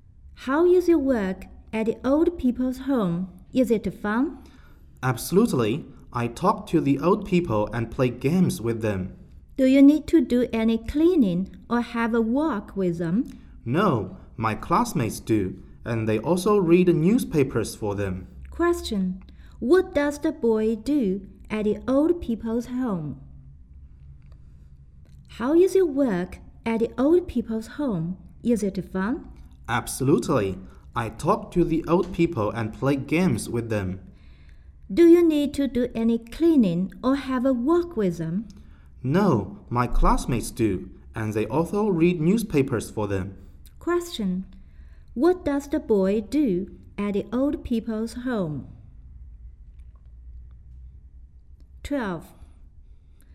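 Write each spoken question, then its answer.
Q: What does the boy do at the old people's home?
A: He talks to the old people and plays games with them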